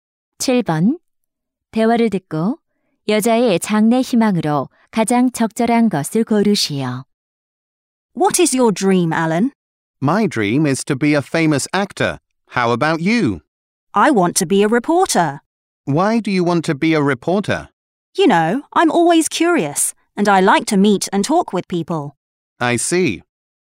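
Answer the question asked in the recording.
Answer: 기자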